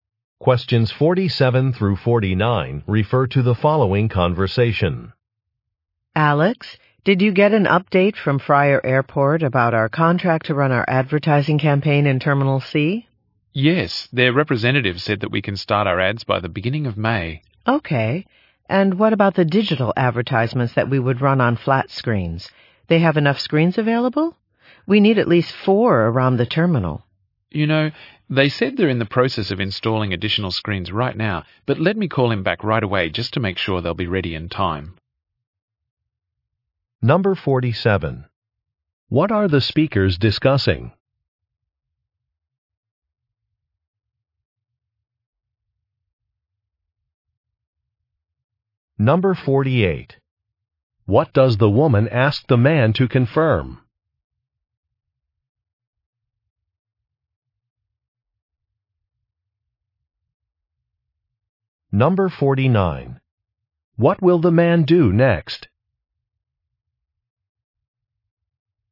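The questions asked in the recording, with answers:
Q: What are the speakers discussing?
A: An advertising campaign at an airport

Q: What does the woman ask the man to confirm?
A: Whether enough screens are available

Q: What will the man do next?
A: Call the airport representative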